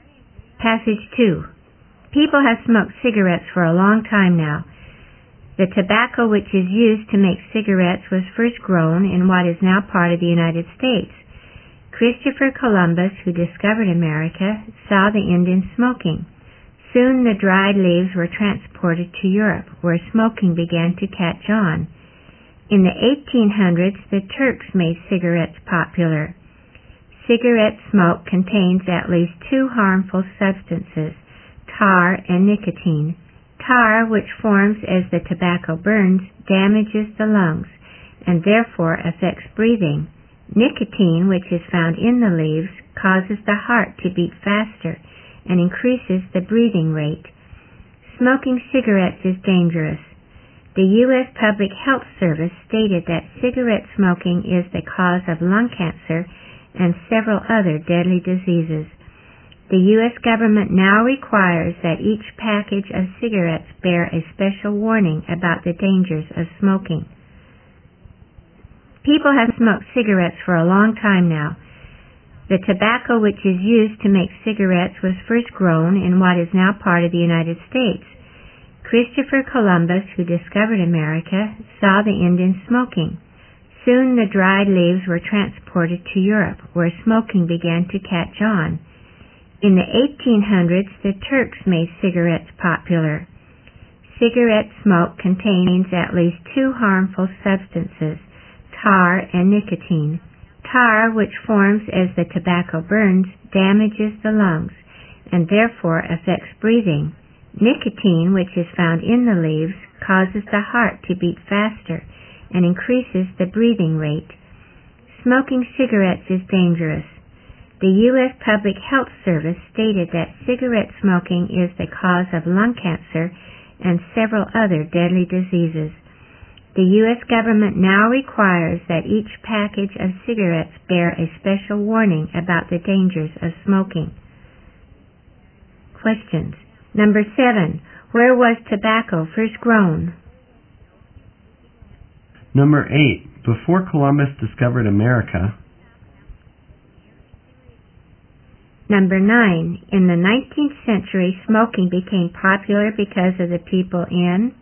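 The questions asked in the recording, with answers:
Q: Where was tobacco first grown?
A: In what is now part of the United States

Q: In the 19th century, smoking became popular because of the people in...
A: Turkey (the Turks)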